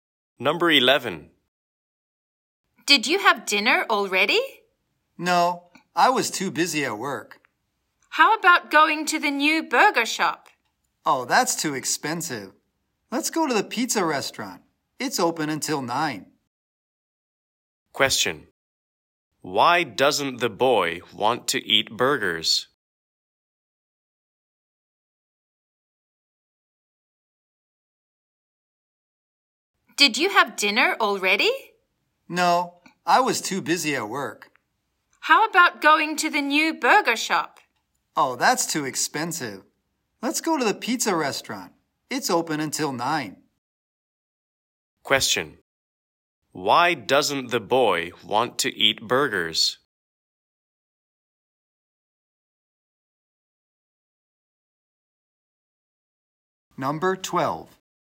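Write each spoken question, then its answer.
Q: Why doesn't the boy want to eat burgers?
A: It's too expensive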